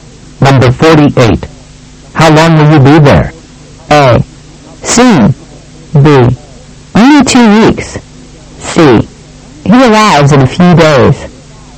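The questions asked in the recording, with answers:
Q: How long will you be there?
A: B: Only 2 weeks.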